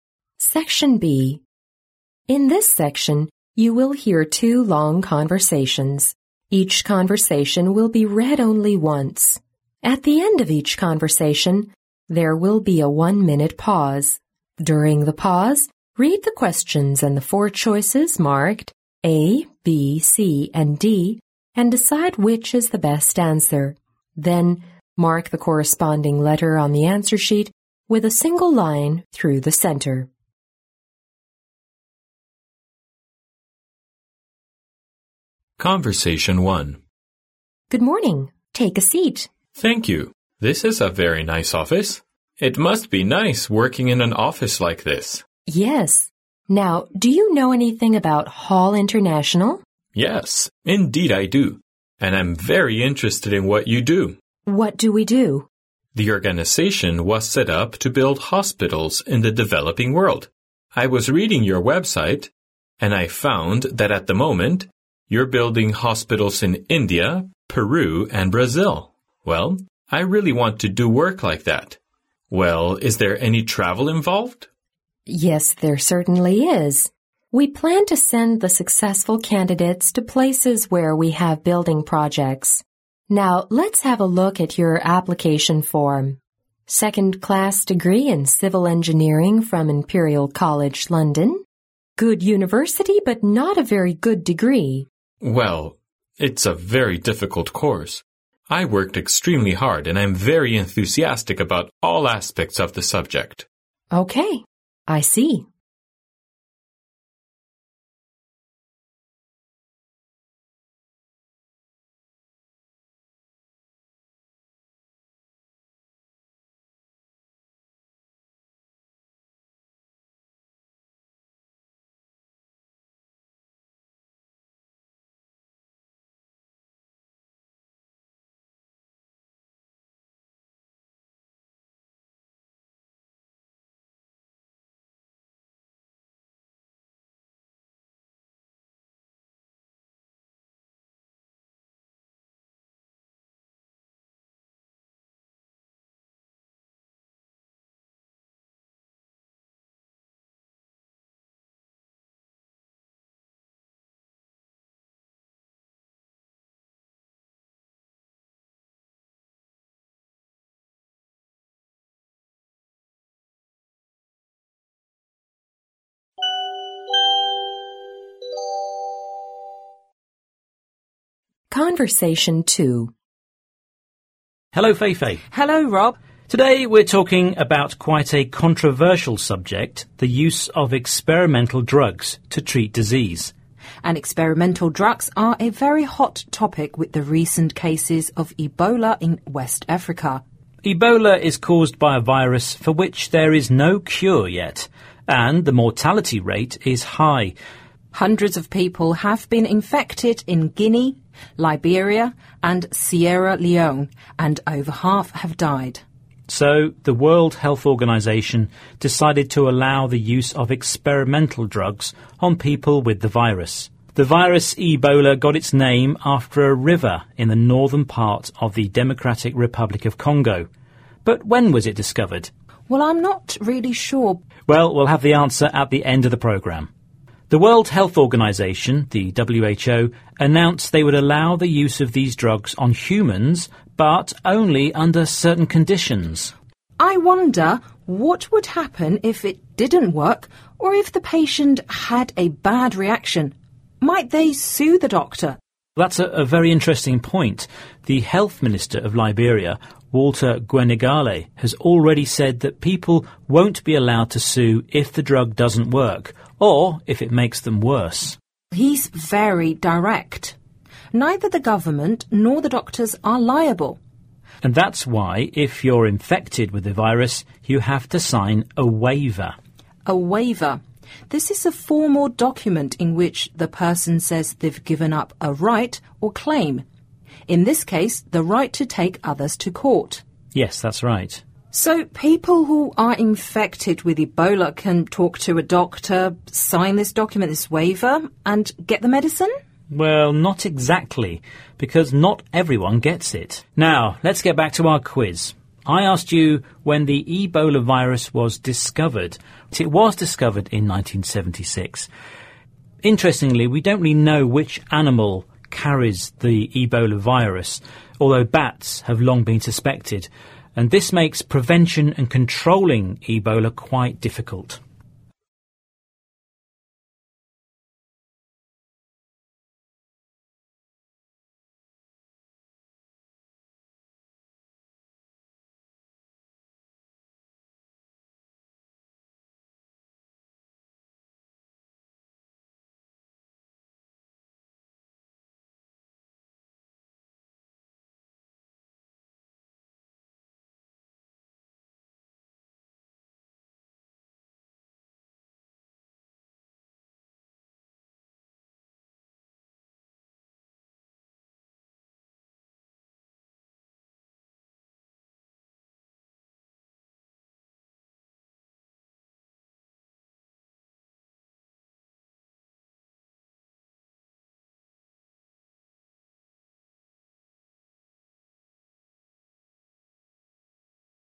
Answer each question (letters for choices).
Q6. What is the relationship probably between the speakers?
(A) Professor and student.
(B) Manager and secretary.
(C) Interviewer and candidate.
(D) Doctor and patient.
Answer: C

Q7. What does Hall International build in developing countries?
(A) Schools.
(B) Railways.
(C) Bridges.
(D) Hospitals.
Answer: D

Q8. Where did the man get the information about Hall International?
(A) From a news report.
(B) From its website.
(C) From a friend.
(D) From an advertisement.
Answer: B

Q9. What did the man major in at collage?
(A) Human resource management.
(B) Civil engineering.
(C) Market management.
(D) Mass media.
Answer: B

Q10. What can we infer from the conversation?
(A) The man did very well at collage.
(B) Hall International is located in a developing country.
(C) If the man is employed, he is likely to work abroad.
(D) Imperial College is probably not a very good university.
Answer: C

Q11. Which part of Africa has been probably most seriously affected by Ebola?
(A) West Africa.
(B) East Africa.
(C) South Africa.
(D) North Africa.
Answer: A

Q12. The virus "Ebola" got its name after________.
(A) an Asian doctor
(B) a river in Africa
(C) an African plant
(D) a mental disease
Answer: B

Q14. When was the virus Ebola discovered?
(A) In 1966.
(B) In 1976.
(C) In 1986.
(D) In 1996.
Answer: B

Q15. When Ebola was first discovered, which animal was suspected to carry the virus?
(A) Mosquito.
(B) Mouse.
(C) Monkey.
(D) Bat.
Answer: D

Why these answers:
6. 根据录音中提到的"This is a very nice office"可知,他们是在一个办公室里,再根据后面的"we plan to send the successful candidates to ... Let's have a look at your application form",可以断定他们是面试官和候选人,因此C为正确选项。
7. 录音中提到"The organization was set up to build hospitals in the developing world(该机构成立的目的是在发展中国家修建医院)",因此D为正确选项。
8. 录音中男士提到"I was reading your website",可知他是从网站上了解的信息,因此B为正确选项。
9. 女士在看男士简历时提到"second class degree in Civil Engineering",由此推断男士的专业是土木工程,B为正确选项。
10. 录音中女士提到"Good university, but not a very good degree.",由此可排除A项和D项。录音中提到Hall International是为发展中国家修建医院,并不能看出它在发展中国家,因此B项错误。录音中男士最后说,"I worked extremely hard and I'm very enthusiastic about all aspects of the subject.",由此推断男士在努力争取被聘用的机会,而很多项目都是在发展中国家,因此如果他被雇佣了,他很可能去国外工作。
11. 录音中提到"with the recent cases of Ebola in West Africa.",以及"Hundreds of people have been infected in Guinea, Liberia and Sierra Leone"可知,感染埃博拉最严重的地区是西非,因此A为正确选项。
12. 录音中提到"The virus Ebola got its name after arriver in the northern part of the Democratic Republic of Congo.",刚果在非洲,因此埃博拉病毒是根据非洲的一条河流来命名的,B为正确选项。
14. 录音中提到"it was discovered in 1976",因此埃博拉病毒是在1976年被发现的,B为正确选项。
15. 录音最后提到"although bat have long been suspected",由此可知,人们怀疑蝙蝠身上携带埃博拉病毒,D为正确选项。